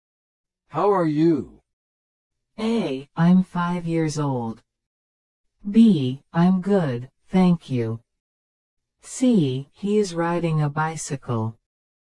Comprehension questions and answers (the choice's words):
Select the best response to the question or statement and mark the letter (A), (B), or (C) on your answer sheet.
How are you?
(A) I'm five years old.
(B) I'm good, thank you.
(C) He is riding a bicycle.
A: I'm good, thank you.

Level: 初級者用